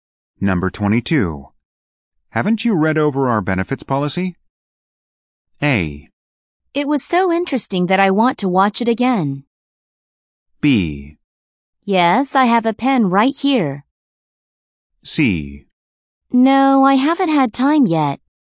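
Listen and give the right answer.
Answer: C: No, I haven't had time yet.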